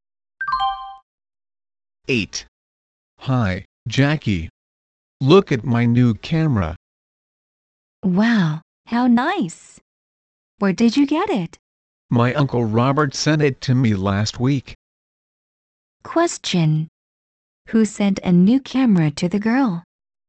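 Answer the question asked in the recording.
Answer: Her Uncle Robert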